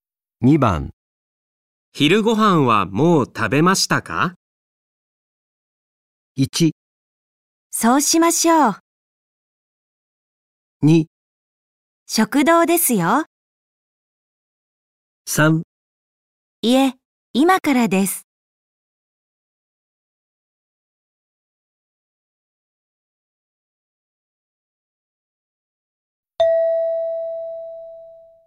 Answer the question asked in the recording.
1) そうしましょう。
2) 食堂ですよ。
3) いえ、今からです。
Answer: 3) いえ、今からです。

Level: N5 Listening · Test 1